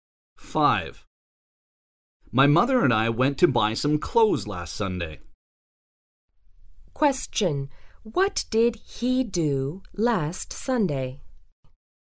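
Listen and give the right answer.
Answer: He went to buy clothes with his mother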